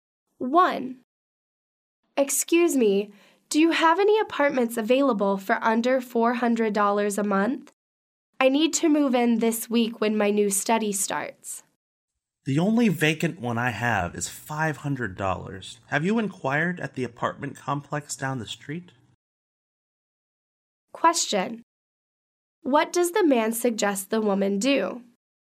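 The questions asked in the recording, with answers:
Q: What does the man suggest the woman do?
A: Ask about an apartment at the apartment complex down the street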